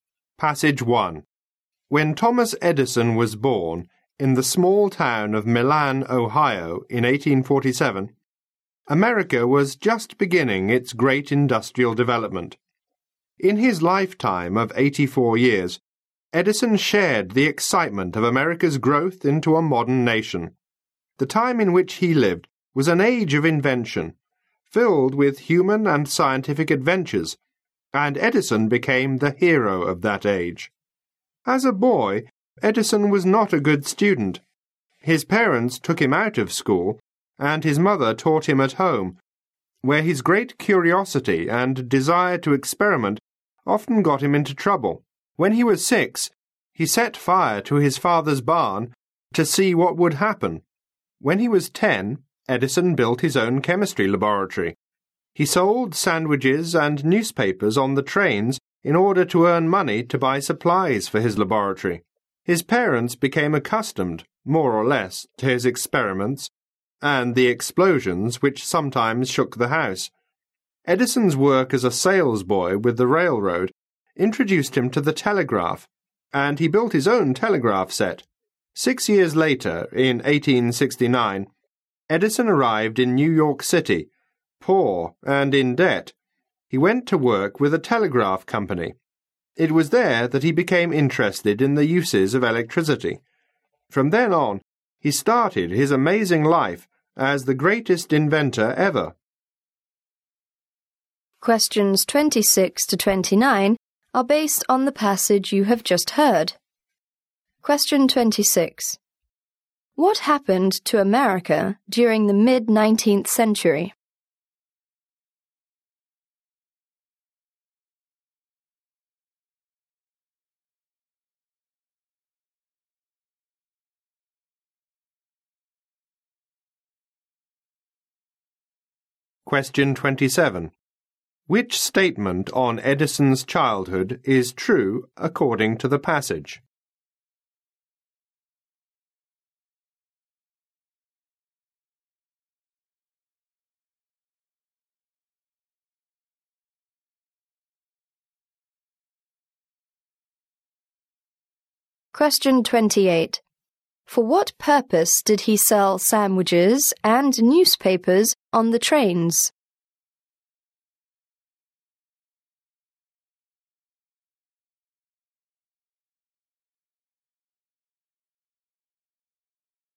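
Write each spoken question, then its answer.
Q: What happened to America during the mid-19th century?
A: It was beginning its great industrial development.

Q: For what purpose did he sell sandwiches and newspapers on the trains?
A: To earn money to buy supplies for his laboratory.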